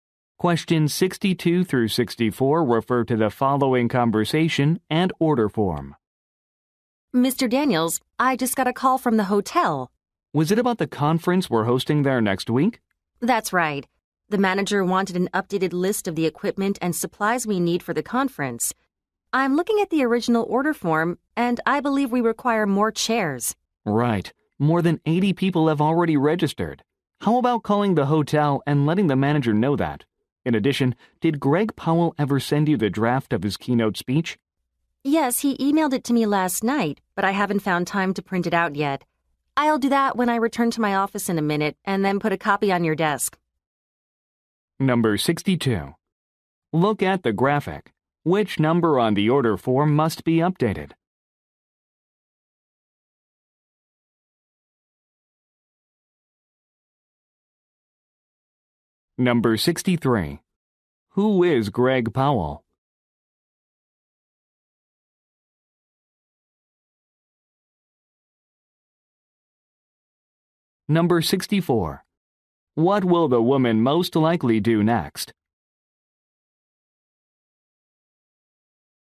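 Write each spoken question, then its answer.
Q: Who is Greg Powell?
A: The keynote speaker

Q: What will the woman most likely do next?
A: Print the speech draft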